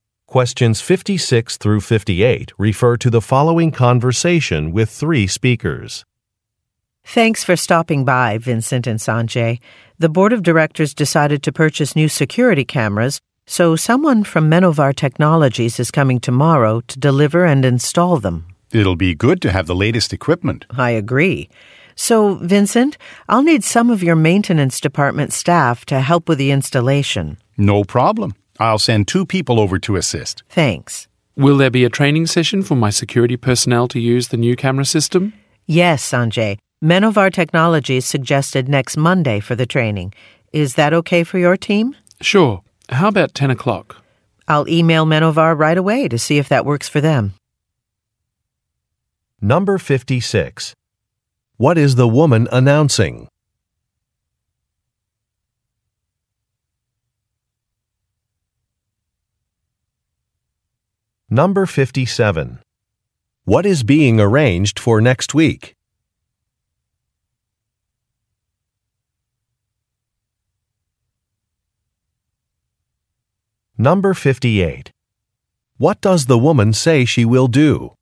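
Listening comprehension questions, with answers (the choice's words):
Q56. What is the woman announcing?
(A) A design has been approved.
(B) Some employees will be promoted.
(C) Some equipment will be installed.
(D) A security inspection will take place soon.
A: Some equipment will be installed.

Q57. What is being arranged for next week?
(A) A board meeting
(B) A training session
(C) A company luncheon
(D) A job interview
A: A training session

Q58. What does the woman say she will do?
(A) Confirm a time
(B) Test some software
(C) Visit a facility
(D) Review a proposal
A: Confirm a time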